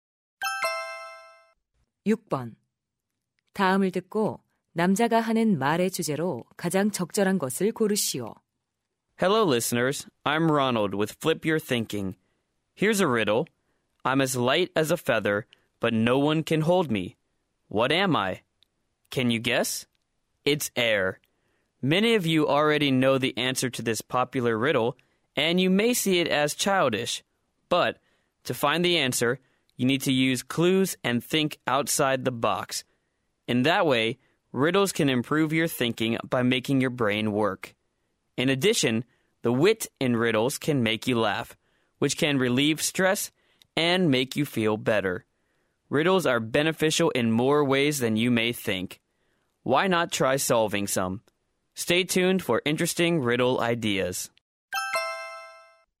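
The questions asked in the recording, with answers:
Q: 다음을 듣고 남자가 하는 말의 주제로 가장 적절한 것을 고르시오.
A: 수수께끼 풀이의 이점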